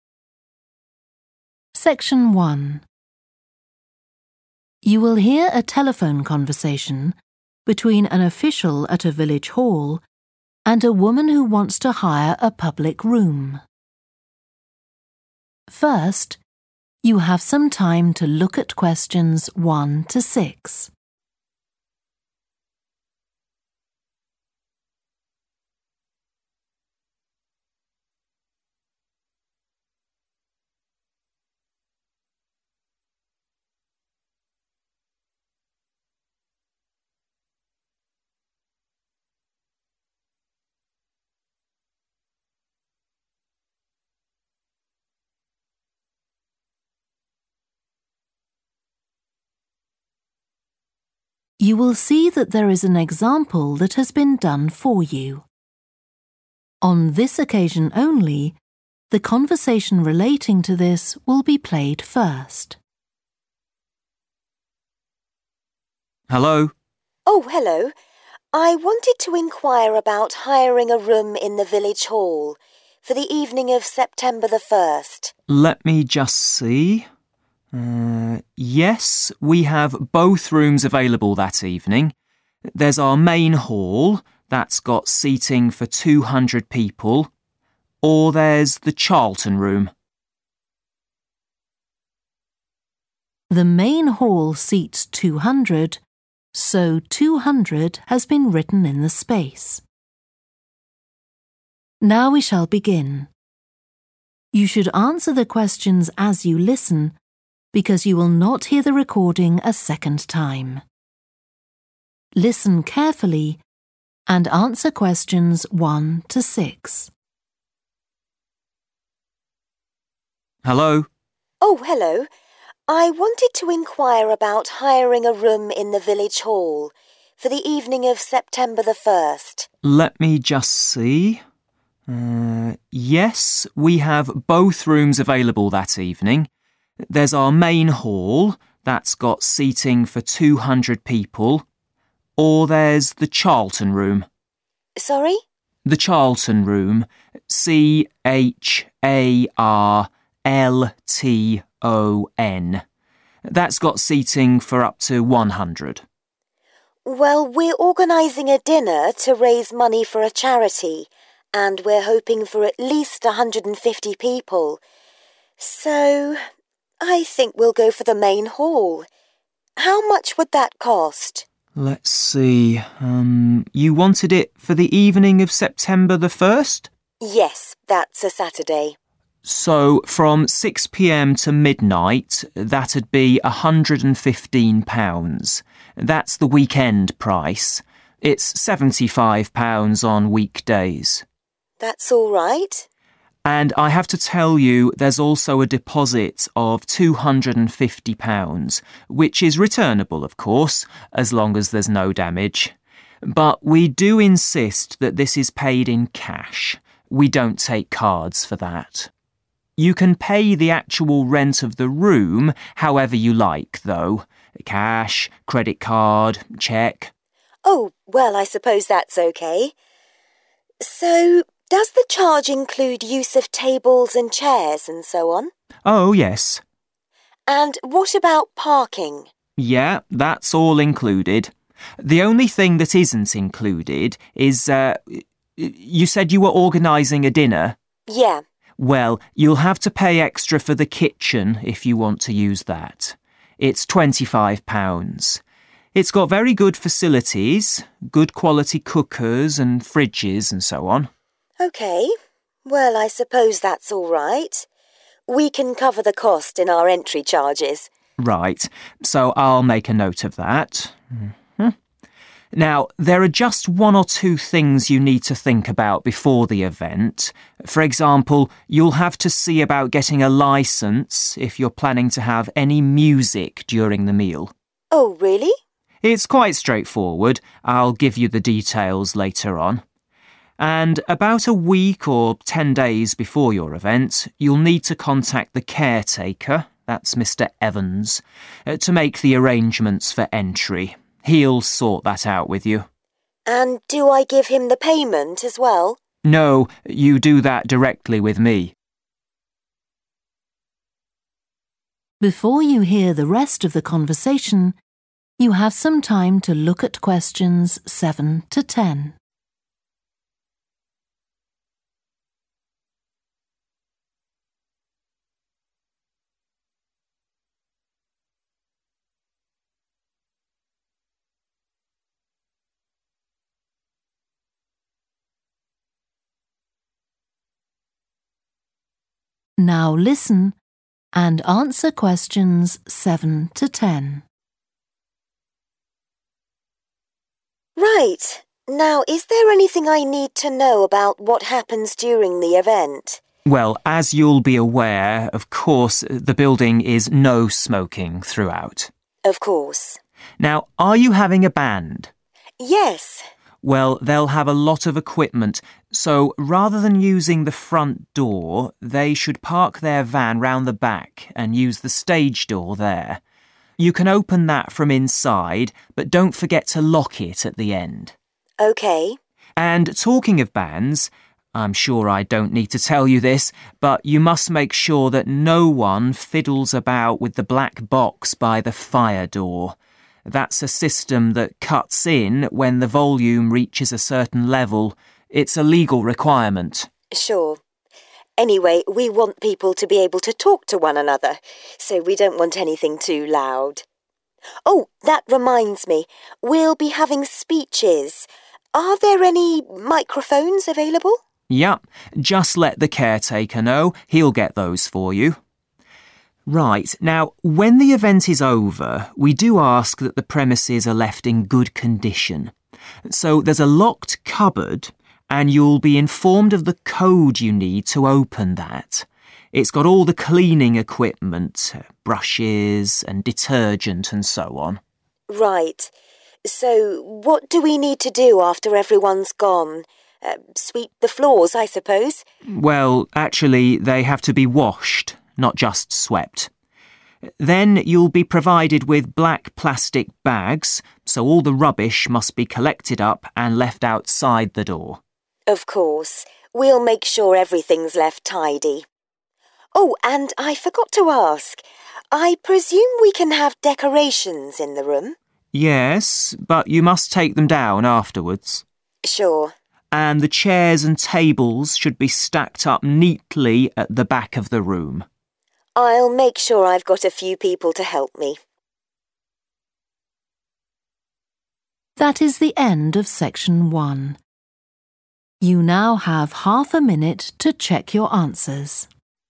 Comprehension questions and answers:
Complete the notes below. Write ONE WORD AND/OR A NUMBER for each answer.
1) the _____ Room – seats 100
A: Charlton

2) Cost of Main Hall for Saturday evening: £ _____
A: 115

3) + £250 deposit ( _____ payment is required)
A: cash

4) Cost includes use of tables and chairs and also _____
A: parking

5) Will need a _____ licence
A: music

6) Need to contact caretaker (Mr Evans) in advance to arrange _____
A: entry

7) The bank should use the _____ door at the back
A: stage

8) Need to know the _____ for the cleaning cupboard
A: code

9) The _____ must be washed and rubbish placed in black bags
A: floor / floors

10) All _____ Must be taken down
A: decoration / decorations

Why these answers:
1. The transcript mentions the Charlton Room, which can accommodate up to one hundred people. Answer Explanation: The answer is 'Charlton,' referring to a specific room named Charlton that can seat up to one hundred individuals. Reason For Correctness: The correct answer matches the name of the room mentioned in the excerpt, which is the Charlton Room with seating for up to one hundred people.
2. The transcript mentions that from 6 pm to midnight, the cost for hiring the Main Hall is £115 on weekends and £75 on weekdays. Answer Explanation: The answer '115' represents the cost of hiring the Main Hall for Saturday evening based on the information provided in the excerpt. Reason For Correctness: The correct answer is '115' because it matches the cost mentioned in the excerpt for hiring the Main Hall on weekends, which is explained as £115 for the specified time period.
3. The transcript says that the organization prefers to receive money directly in the form of bills, not using a credit or debit card. Answer Explanation: The answer 'cash' means using physical money in the form of bills and coins. Reason For Correctness: The correct answer 'cash' is right because the part of the transcript says that they do not accept 'cards' for the deposit, suggesting they only accept physical 'cash' money.
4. The transcript is asking about the availability or arrangements for parking. Answer Explanation: The answer refers to parking, which is the space where cars can be left when someone attends an event. Reason For Correctness: The correct answer matches with the topic discussed in the excerpt, which is related to facilities or arrangements for guests attending the event. 'Parking' is an essential consideration for organizing any event where guests will arrive by car.
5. The excerpt is saying that if you want to have any music playing during the event, you will need to arrange to get a license. Answer Explanation: The answer 'music' refers to having music playing during the event. Reason For Correctness: The correct answer matches perfectly with the requirement mentioned in the excerpt that a license is needed for having music during the event, making it the right choice.
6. The transcript mentions that about a week or ten days before the event, you should contact the caretaker, Mr. Evans, to arrange something. He will help you with this. Answer Explanation: The answer refers to the action of arranging something before the event, specifically related to gaining access or permission to enter the venue. Reason For Correctness: The correct answer is 'entry' because it matches the context of needing to contact the caretaker to sort out entry arrangements as mentioned in the excerpt. Contacting Mr. Evans for 'entry' likely involves discussions about when and how attendees can enter the premises before the event.
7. The transcript is mentioning that individuals with a lot of equipment should park their van at the back and use a specific entrance in the building called the stage door. Answer Explanation: The answer 'stage' refers to a specific entrance called the stage door mentioned in the transcript. Reason For Correctness: The correct answer is 'stage' because it directly corresponds to the stage door mentioned in the excerpt. This answer matches the location provided in the text where individuals are advised to enter the building.
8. The transcript mentions that there is a locked cupboard, and someone will tell you the code needed to open it. Answer Explanation: The answer refers to a code that is required to open the locked cupboard. Reason For Correctness: The correct answer matches the situation described in the excerpt where a specific code is needed to access the locked cupboard. This code is essential for unlocking and accessing the items stored inside the cupboard.
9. The transcript mentions sweeping the floors after everyone has left, indicating a task that needs to be done after an event. Answer Explanation: The answer 'floor' refers to the surface on which cleaning, specifically sweeping, is required after an event. Reason For Correctness: The correct answer is appropriate because it directly matches the action mentioned in the excerpt, which is cleaning the floors. 'Floor' is a simple word that indicates the surface area that needs to be swept after an event to keep the place clean.
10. The transcript shows a person asking if they can have decorations in the room for the event. Answer Explanation: The answer refers to 'decorations,' which are items used to make a place look more attractive or festive. Reason For Correctness: The correct answer aligns with the context provided in the excerpt, where the person is inquiring about the possibility of having decorations in the room for the event. It matches the topic of enhancing the room's appearance or atmosphere with decorative items.

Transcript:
OFFICIAL: Hello?
WOMAN: Oh, hello. I wanted to enquire about hiring a room in the Village Hall, for the evening of September the first.
OFFICIAL: Let me just see ... Yes, we have both rooms available that evening. There's our Main Hall – that's got seating for 200 people. Or there's the Charlton Room ...
WOMAN: Sorry?
OFFICIAL: The Charlton Room – C-H-A-R-L-T-O-N.
WOMAN: Well, we're organising a dinner to raise money for a charity, and we're hoping for at least 150 people, so I think we'll go for the Main Hall. How much would that cost?
WOMAN: Yes, that's a Saturday.
OFFICIAL: So from six pm to midnight that'd be £115 – that's the weekend price, it's £75 on weekdays.
WOMAN: That's all right.
OFFICIAL: And I have to tell you there's also a deposit of £250, which is returnable of course as long as there's no damage. But we do insist that this is paid in cash, we don't take cards for that. You can pay the actual rent of the room however you like though – cash, credit card, cheque ...
WOMAN: Oh, well I suppose that's OK. So does the charge include use of tables and chairs and so on?
OFFICIAL: Oh, yes.
WOMAN: And what about parking?
OFFICIAL: Yeah, that's all included. The only thing that isn't includes is ... you said you were organising a dinner?
WOMAN: Yeah.
OFFICIAL: Well, you'll have to pay extra for the kitchen if you want to use that. It's £25. It's got very good facilities – good quality cookers and fridges and so on.
We can cover the cost in our entry charges.
OFFICIAL: Right. So I'll make a note of that. Now there are just one or two things you need to think about before the event. For example, you'll have to see about getting a licence if you're planning to have any music during the meal.
WOMAN: Oh, really?
OFFICIAL: It's quite straightforward, I'll give you the details later on. And about a week or ten days before your event you'll need to contact the caretaker, that's Mr Evans, to make the arrangements for entry – he'll sort that out with you.
WOMAN: And do I give him the payment as well?
OFFICIAL: No, you do that directly with me.
WOMAN: Right. Now is there anything I need to know about what happens during the event?
OFFICIAL: Well, as you'll be aware, of course the building is no smoking throughout.
WOMAN: Of course.
OFFICIAL: Now, are you having a band?
WOMAN: Yes.
OFFICIAL: Well, they'll have a lot of equipment, so rather than using the front door they should park their van round the back and use the stage door there. You can open that from inside but don't forget to lock it at the end.
WOMAN: OK.
OFFICIAL: And talking of bands, I'm sure I don't need to tell you this, but you must make sure that no one fiddles about with the black box by the fire door – that's a system that cuts in when the volume reaches a certain level. It's a legal requirement.
WOMAN: Sure. Anyway, we want people to be able to talk to one another so we don't want anything too loud. Oh, that reminds me, we'll be having speeches – are there any microphones available?
OFFICIAL: Yeah. Just let the caretaker know, he'll get those for you. Right, now when the event is over we do ask that the premises are left in good condition. So there's a locked cupboard and you'll be informed of the code you need to open that. It's got all the cleaning equipment, brushes and detergent and so on.
WOMAN: Right. So what do we need to do after everyone's gone? Sweep the floors I suppose?
OFFICIAL: Well, actually they have to be washed, not just swept. Then you'll be provided with black plastic bags, so all the rubbish must be collected up and left outside the door.
WOMAN: Of course. We'll make sure everything's left tidy. Oh, and I forgot to ask, I presume we can have decorations in the room?
OFFICIAL: Yes, but you must take them down afterwards.
WOMAN: Sure.
OFFICIAL: And the chairs and tables should be stacked up neatly at the back of the room
WOMAN: I'll make sure I've got a few people to help me.